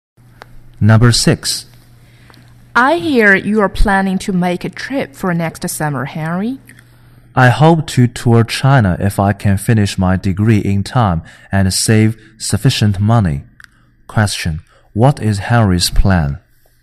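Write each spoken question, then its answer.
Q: What is Henry's plan?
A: To tour China next summer if he finishes his degree and saves enough money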